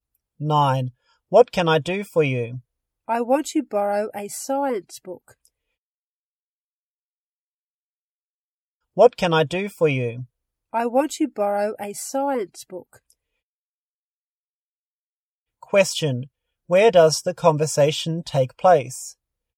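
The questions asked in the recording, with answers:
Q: Where does the conversation take place?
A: In a library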